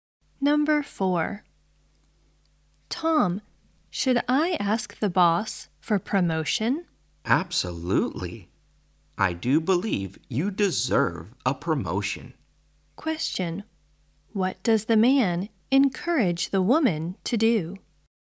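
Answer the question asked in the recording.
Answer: Ask the boss for a promotion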